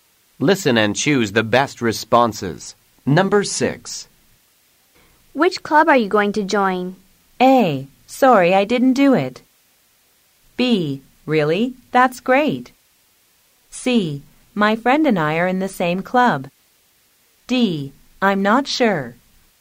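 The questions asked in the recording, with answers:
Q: Which club are you going to join?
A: D: I'm not sure.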